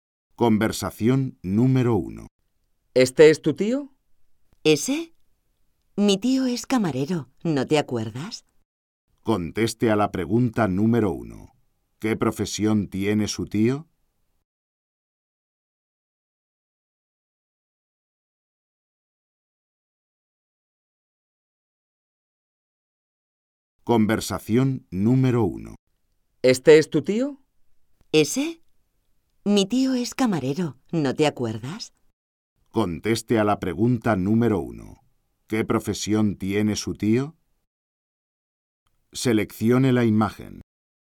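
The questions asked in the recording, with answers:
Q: ¿Qué profesión tiene su tío?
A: Camarero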